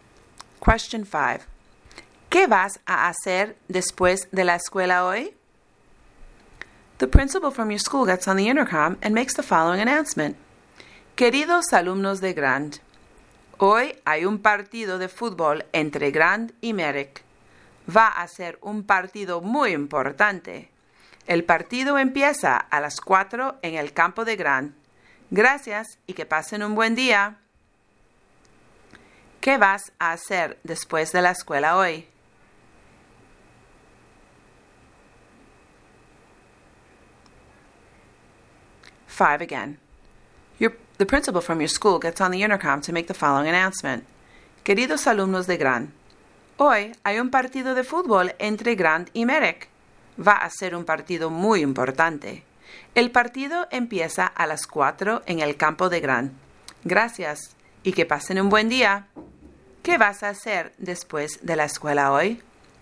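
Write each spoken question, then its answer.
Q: ¿Qué vas a hacer después de la escuela hoy?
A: Ir al partido de fútbol entre Grand y Merrick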